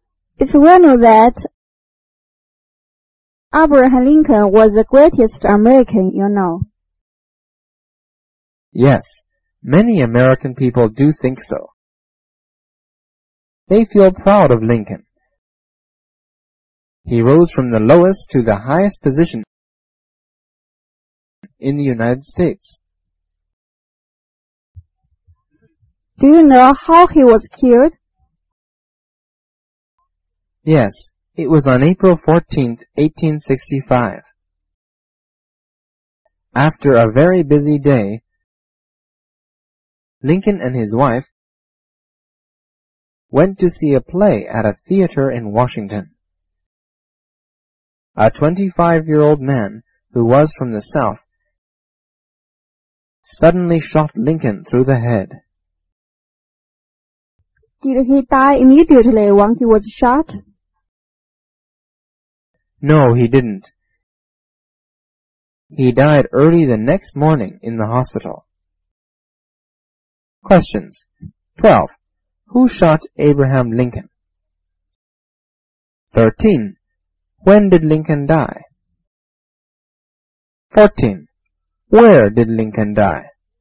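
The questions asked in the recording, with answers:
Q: Who shot Abraham Lincoln?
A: A 25-year-old man from the South

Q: When did Lincoln die?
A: Early on the morning of April 15, 1865

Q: Where did Lincoln die?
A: In the hospital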